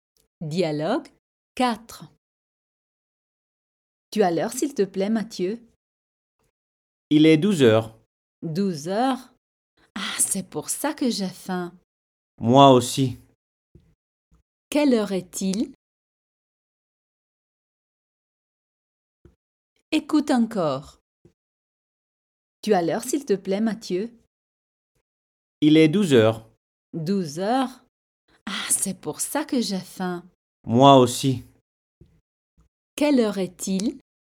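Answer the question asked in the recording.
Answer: 12 heures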